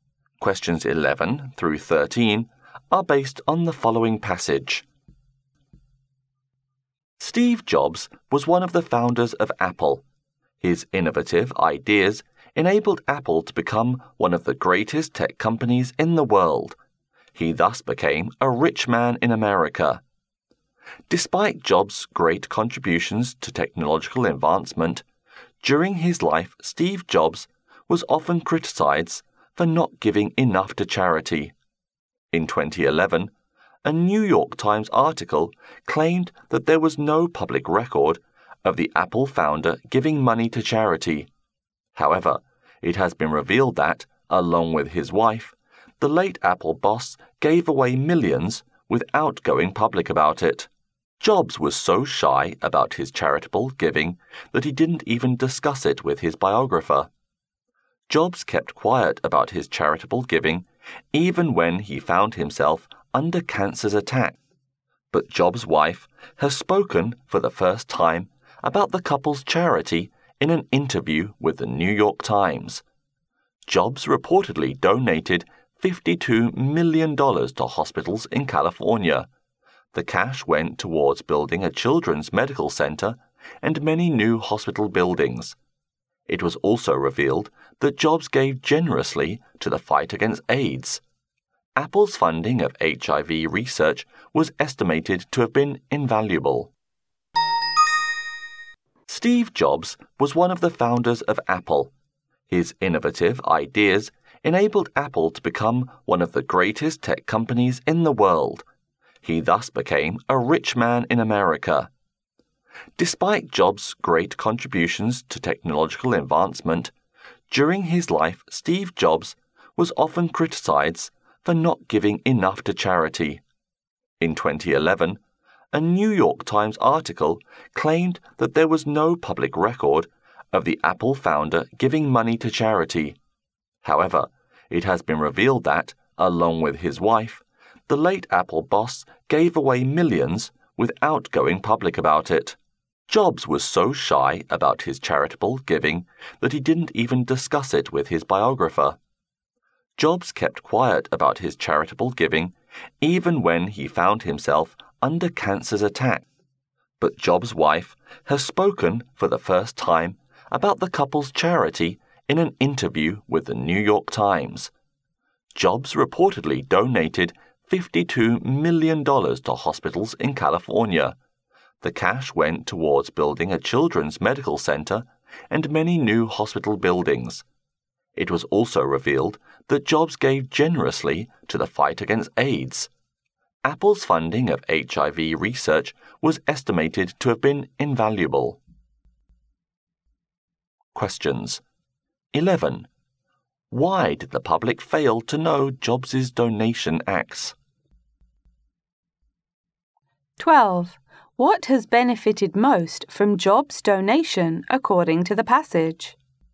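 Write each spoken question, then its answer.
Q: Why did the public fail to know Jobs' donation acts?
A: He kept his giving quiet and never made it public.

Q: What has benefited most from Jobs' donation, according to the passage?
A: Hospitals in California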